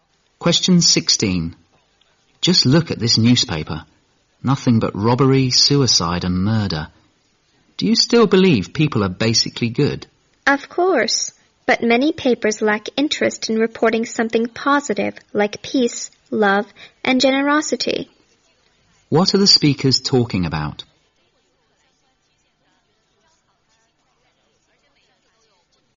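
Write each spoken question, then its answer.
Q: What are the speakers talking about?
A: Newspapers reporting mostly crime and little positive news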